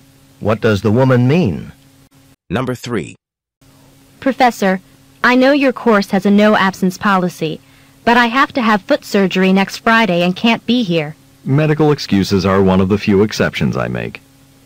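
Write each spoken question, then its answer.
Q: What will the professor probably do?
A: Excuse the student's absence.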